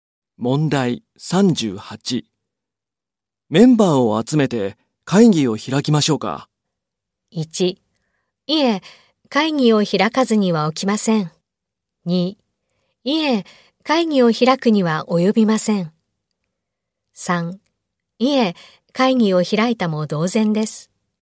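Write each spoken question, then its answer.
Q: メンバーを集めて会議を開きましょうか。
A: 2: いえ、会議を開くには及びません。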